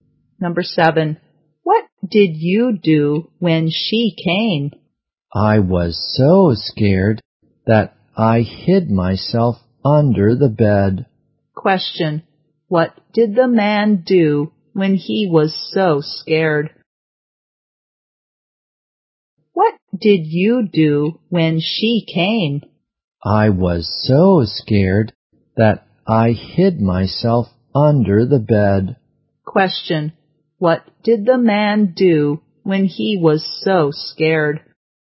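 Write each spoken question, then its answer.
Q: what did the man do when he was so scared?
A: He hid himself under the bed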